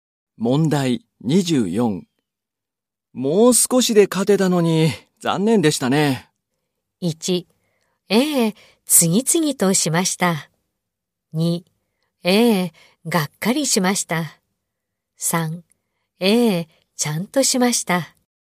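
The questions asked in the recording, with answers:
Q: もう少しで勝てたのに、残念でしたね。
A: 2: ええ、がっかりしました。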